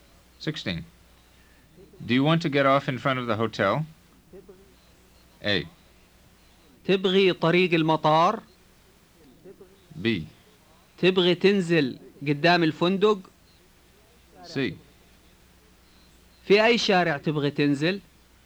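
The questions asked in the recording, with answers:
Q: Do you want to get off in front of the hotel?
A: B: تبغي تنزل قدام الفندق؟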